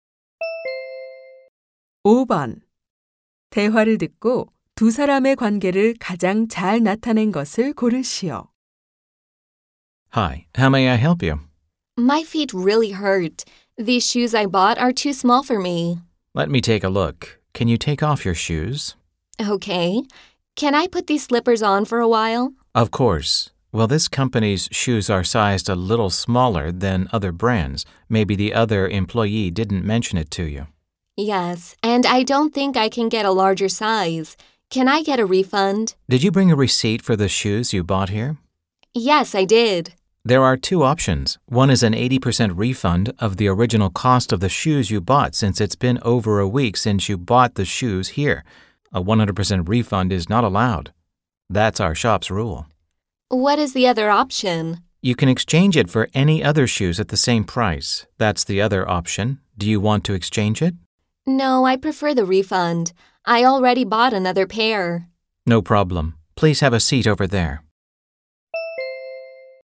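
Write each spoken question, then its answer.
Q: 대화를 듣고 두 사람의 관계를 가장 잘 나타낸 것을 고르시오.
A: 신발 가게 직원 - 손님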